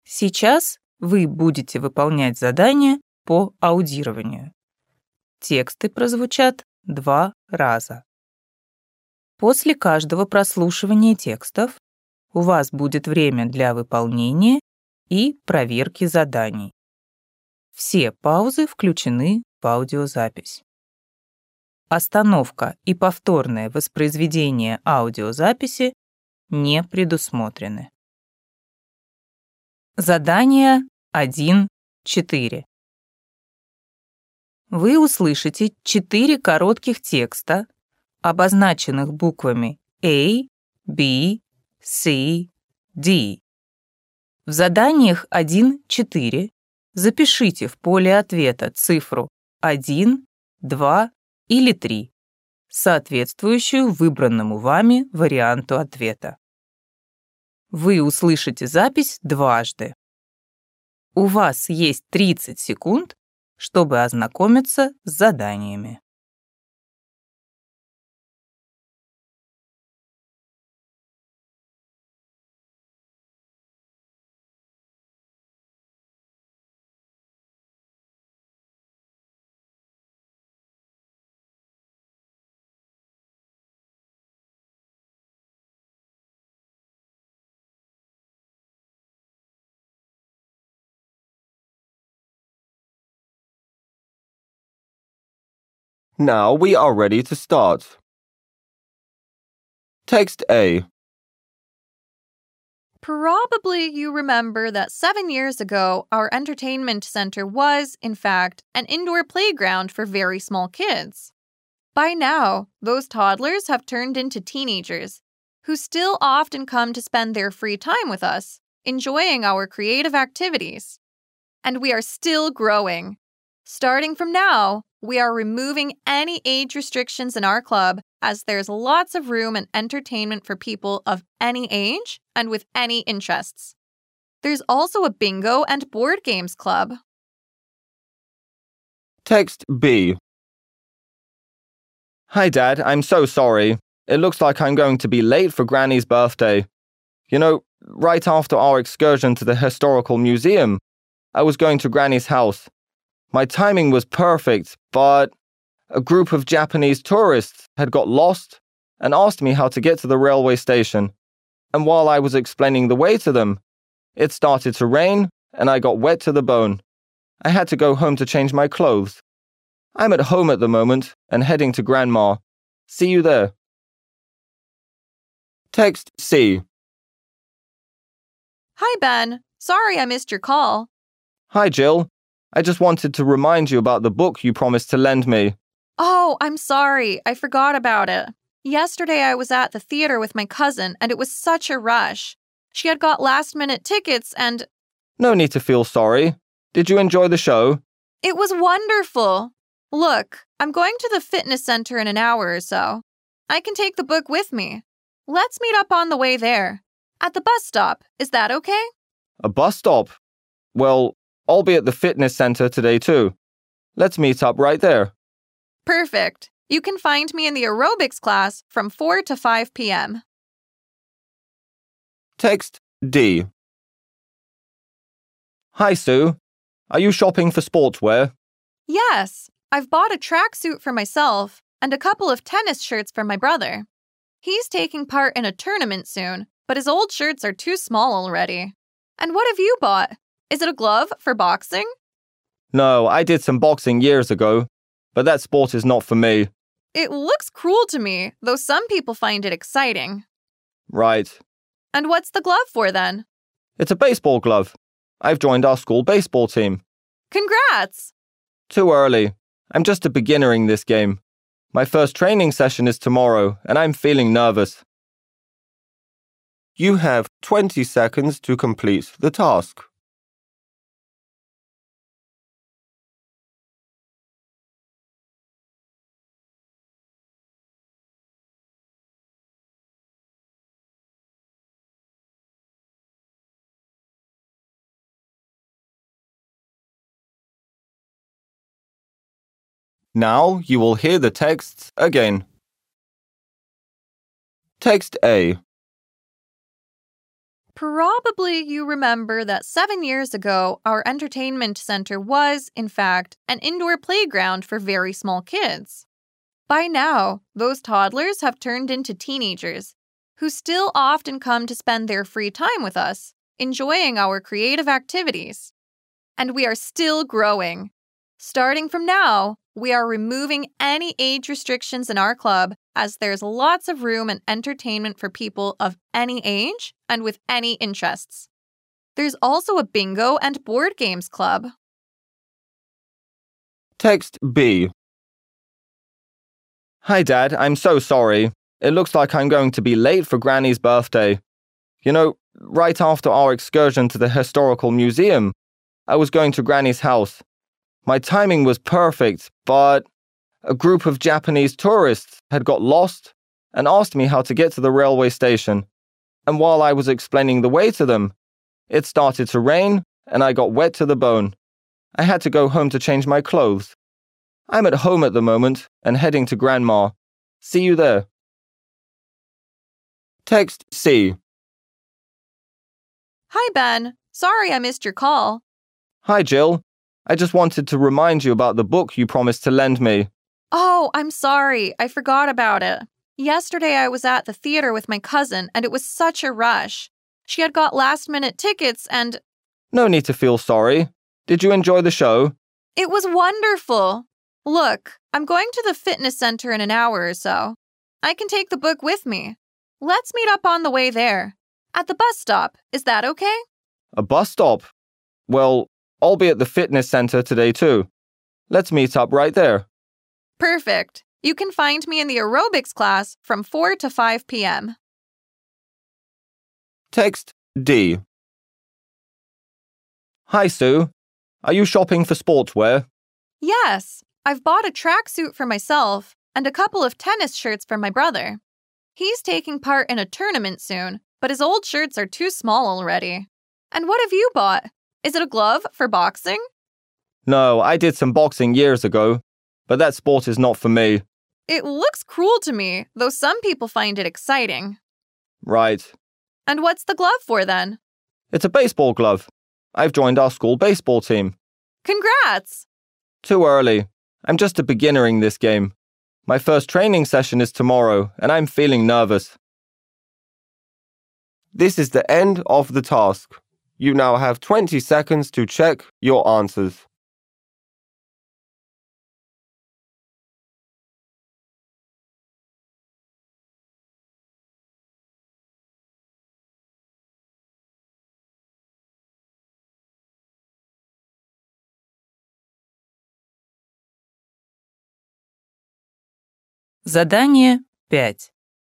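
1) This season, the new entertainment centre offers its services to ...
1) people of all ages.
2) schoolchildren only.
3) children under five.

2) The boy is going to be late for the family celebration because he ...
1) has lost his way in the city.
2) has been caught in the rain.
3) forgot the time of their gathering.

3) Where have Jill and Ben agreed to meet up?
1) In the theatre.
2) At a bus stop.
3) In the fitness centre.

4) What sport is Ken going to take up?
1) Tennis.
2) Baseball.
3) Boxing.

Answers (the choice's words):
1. people of all ages.
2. has been caught in the rain.
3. In the fitness centre.
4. Baseball.

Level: ОГЭ 2026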